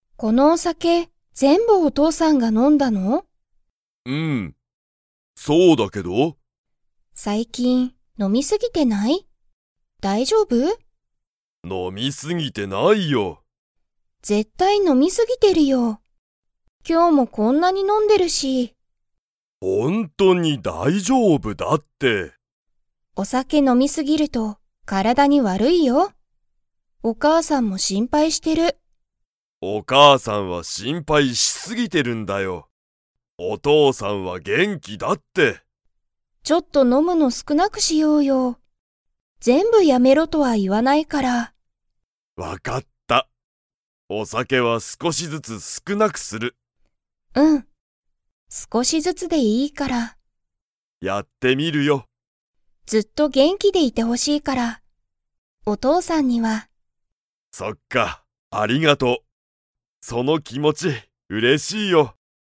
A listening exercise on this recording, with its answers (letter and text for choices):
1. アミも、 も、お父とうさんのことを心配しんぱいしている。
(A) お母かあさん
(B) 友達ともだち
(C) 夫おっと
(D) 先生せんせい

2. アミは、お父とうさんにお酒さけを全部ぜんぶやめろと言いいましたか?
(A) はい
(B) いいえ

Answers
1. (A) お母かあさん
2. (B) いいえ

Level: Level 3